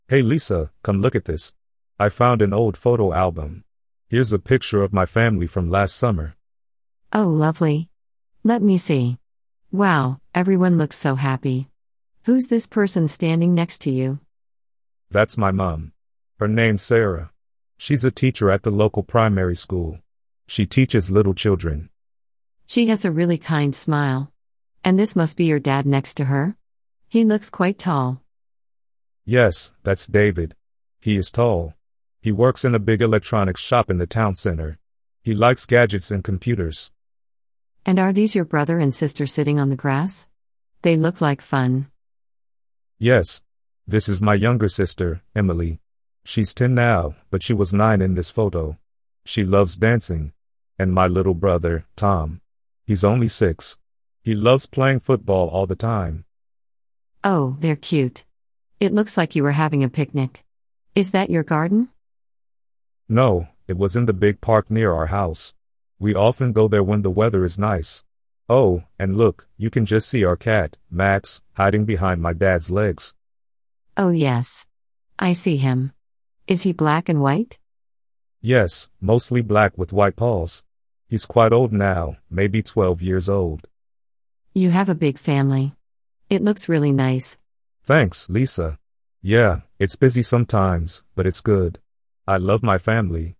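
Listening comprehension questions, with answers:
Read the sentences below. Are they TRUE or FALSE? Choose the correct answer.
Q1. Mark is showing Lisa a new photo.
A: False

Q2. Mark's mother works in a shop.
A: False

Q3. Mark's father is tall and likes computers.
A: True

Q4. Emily is Mark's older sister.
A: False

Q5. The family photo was taken in their garden.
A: False

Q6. The family cat is called Max and is black and white.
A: True

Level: Beginner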